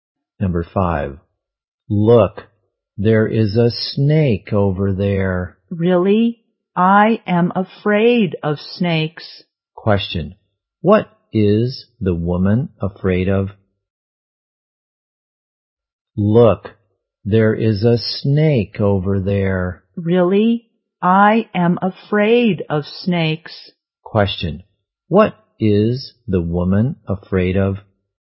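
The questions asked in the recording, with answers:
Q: what is the woman afraid of?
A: Snakes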